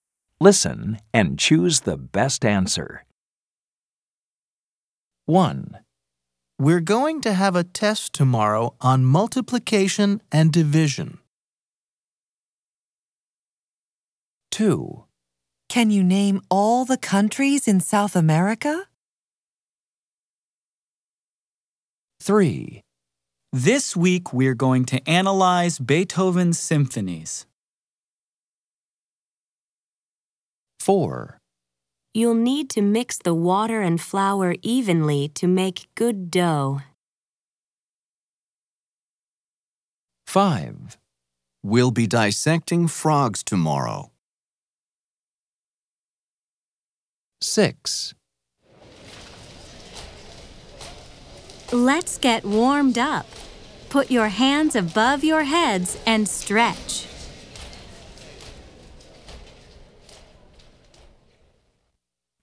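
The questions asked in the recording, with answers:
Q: Which subject?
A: Math

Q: Which subject?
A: Geography

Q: Which subject?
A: Music

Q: Which subject?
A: Physical education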